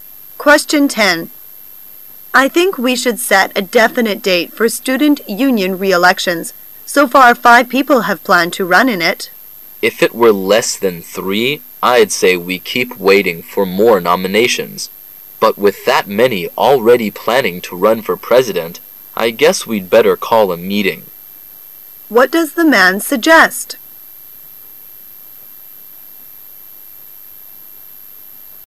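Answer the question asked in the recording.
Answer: Calling a meeting to set a date for the elections.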